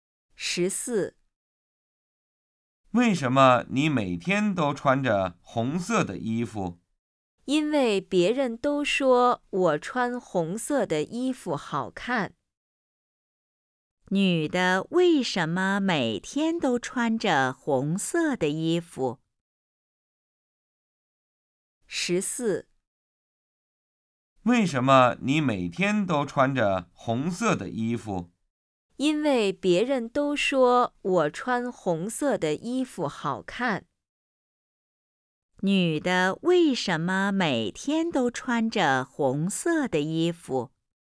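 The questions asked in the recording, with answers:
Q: 女的为什么每天都穿着红色的衣服?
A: 因为别人都说她穿红色的衣服好看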